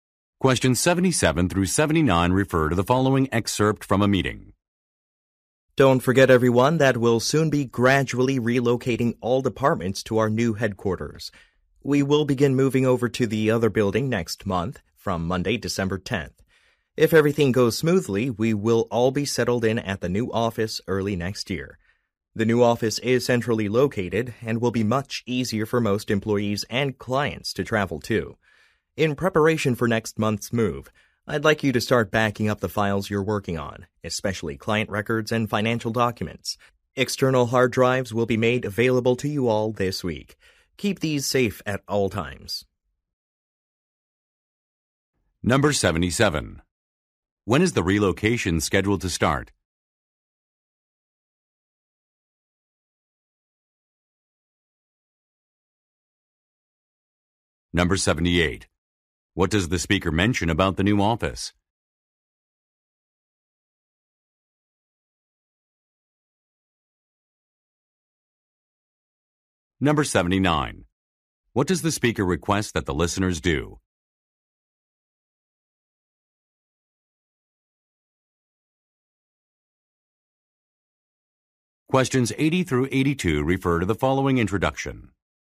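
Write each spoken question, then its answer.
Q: When is the relocation scheduled to start?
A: Next month, on Monday, December 10th

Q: What does the speaker mention about the new office?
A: It is centrally located and easier to travel to

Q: What does the speaker request that the listeners do?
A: Back up their files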